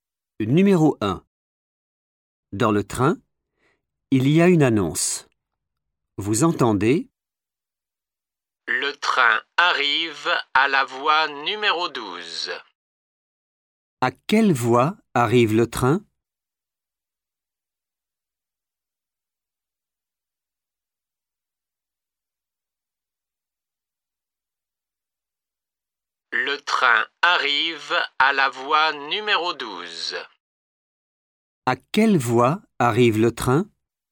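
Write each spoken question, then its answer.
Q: À quelle voie arrive le train?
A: voie numéro 12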